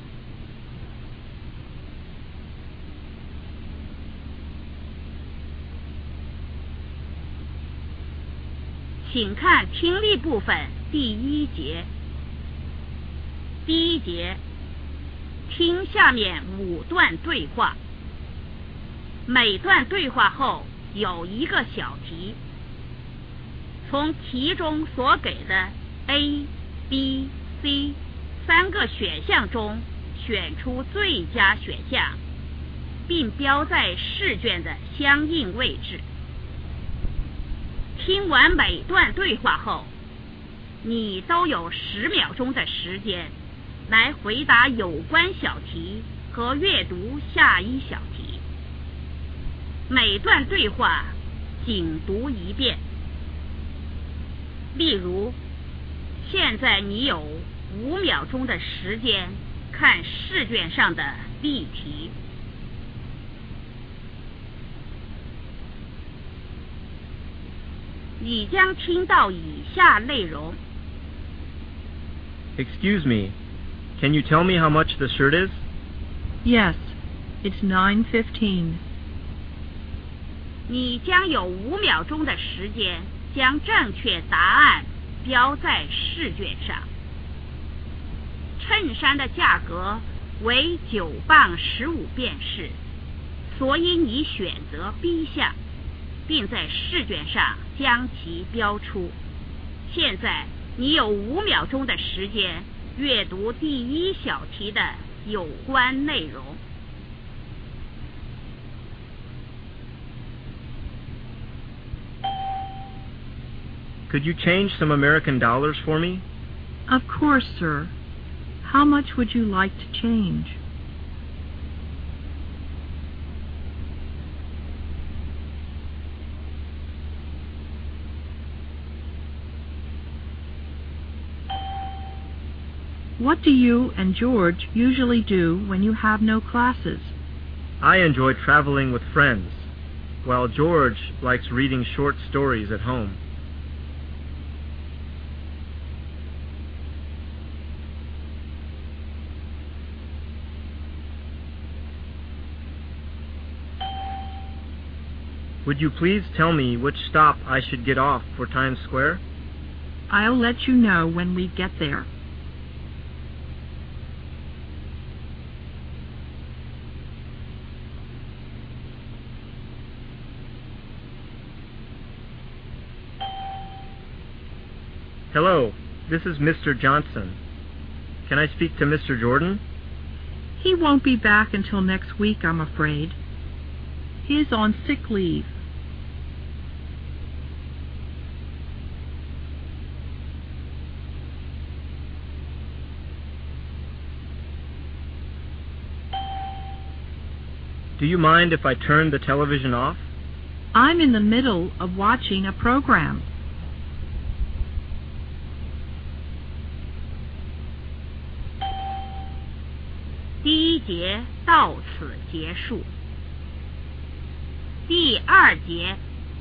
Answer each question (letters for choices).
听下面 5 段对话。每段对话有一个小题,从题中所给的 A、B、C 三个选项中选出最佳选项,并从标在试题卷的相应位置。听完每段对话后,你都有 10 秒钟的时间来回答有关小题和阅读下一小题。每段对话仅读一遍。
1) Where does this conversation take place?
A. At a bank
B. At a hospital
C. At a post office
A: A

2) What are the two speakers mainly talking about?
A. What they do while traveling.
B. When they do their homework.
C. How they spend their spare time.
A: C

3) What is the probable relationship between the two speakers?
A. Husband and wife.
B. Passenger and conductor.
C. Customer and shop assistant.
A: B

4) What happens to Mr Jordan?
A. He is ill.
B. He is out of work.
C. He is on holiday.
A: A

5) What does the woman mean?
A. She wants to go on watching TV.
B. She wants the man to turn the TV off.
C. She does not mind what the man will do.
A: A